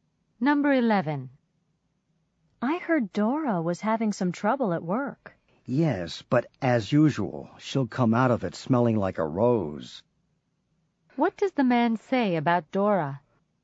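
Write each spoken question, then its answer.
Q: What does the man say about Dora?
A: She'll come out of the trouble fine, as usual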